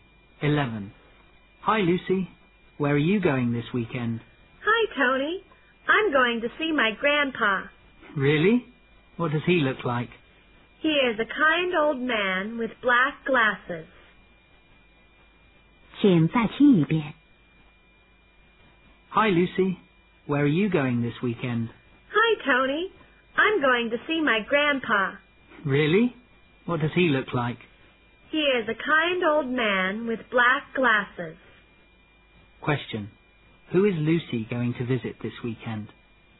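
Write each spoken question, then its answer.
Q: Who is Lucy going to visit this weekend?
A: Her grandpa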